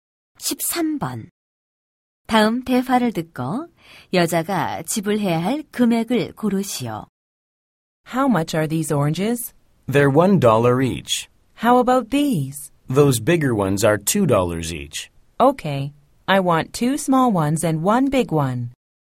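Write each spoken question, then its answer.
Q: 다음 대화를 듣고 여자가 지불 해야 할 금액을 고르시오.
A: 4달러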